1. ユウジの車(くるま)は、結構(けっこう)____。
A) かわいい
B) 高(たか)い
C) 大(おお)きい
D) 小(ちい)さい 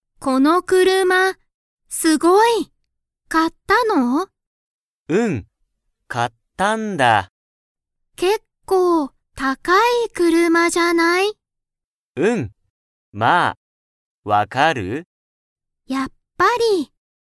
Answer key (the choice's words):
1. 高(たか)い

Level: Level 1